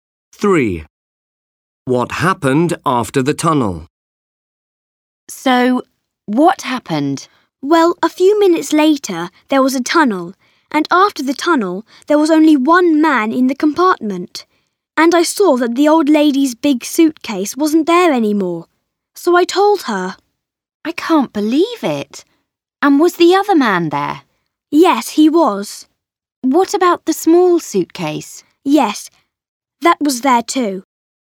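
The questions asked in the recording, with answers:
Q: What happened after the tunnel?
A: Only one man was left and the old lady's big suitcase was gone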